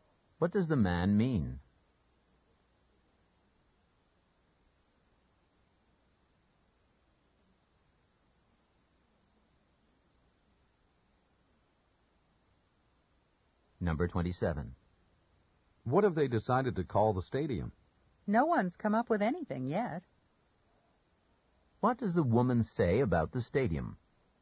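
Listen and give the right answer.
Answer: It hasn't been named yet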